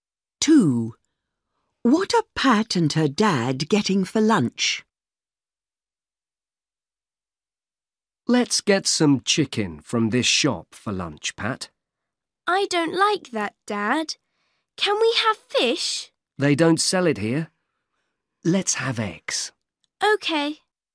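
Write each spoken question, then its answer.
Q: What are Pat and her dad getting for lunch?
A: Eggs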